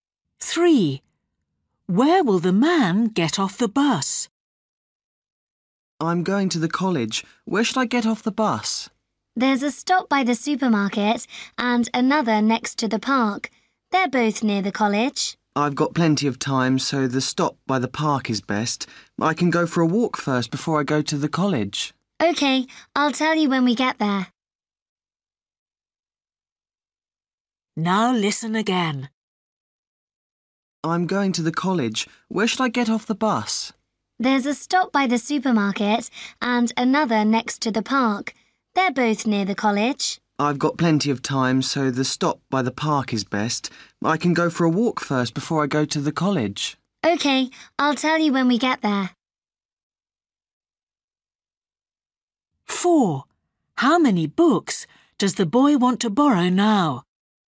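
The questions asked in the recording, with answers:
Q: Where will the man get off the bus?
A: At the stop by the park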